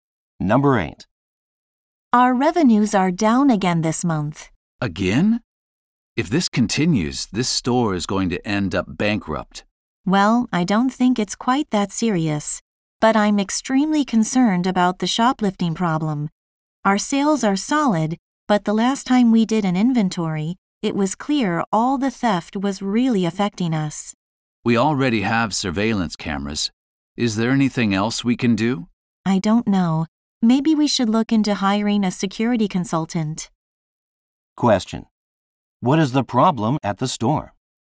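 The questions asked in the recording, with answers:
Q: What is the problem at the store?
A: Shoplifting is reducing revenue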